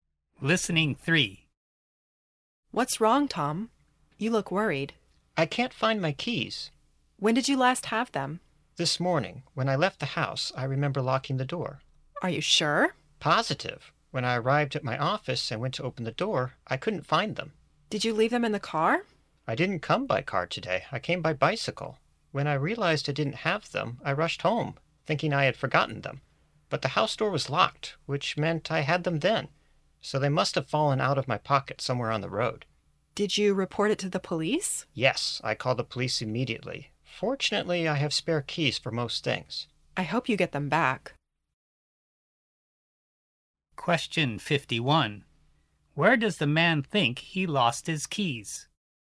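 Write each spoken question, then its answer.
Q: Where does the man think he lost his keys?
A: On the road while riding his bicycle to the office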